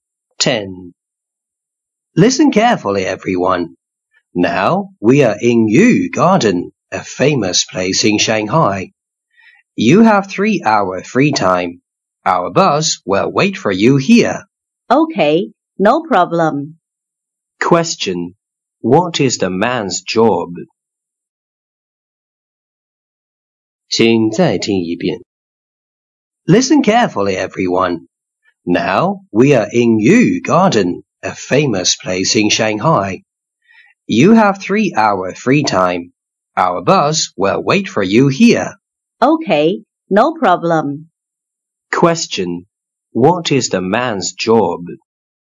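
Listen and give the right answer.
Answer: A tour guide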